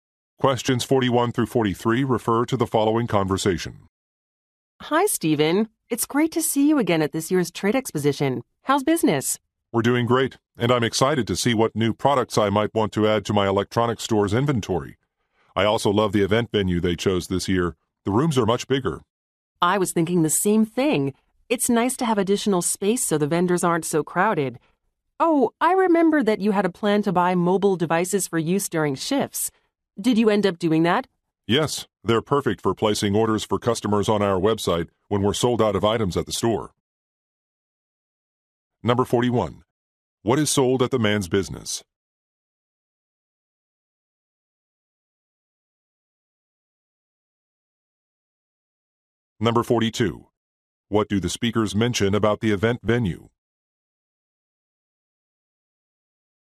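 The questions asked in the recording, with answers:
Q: What is sold at the man's business?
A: Electronics

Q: What do the speakers mention about the event venue?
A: The rooms are bigger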